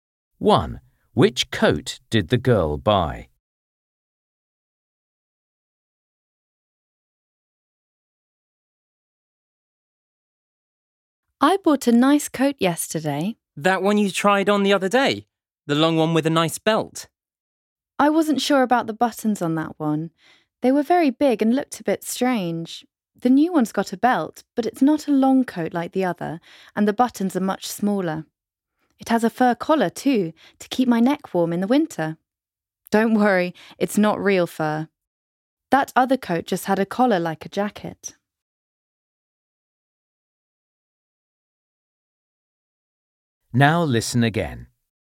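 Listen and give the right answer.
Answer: A short coat with a belt, small buttons and a fur collar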